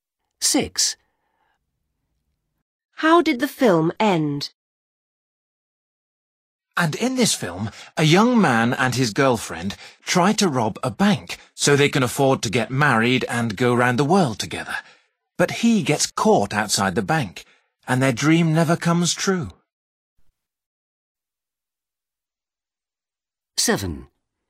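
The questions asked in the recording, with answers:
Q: How did the film end?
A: The man was caught outside the bank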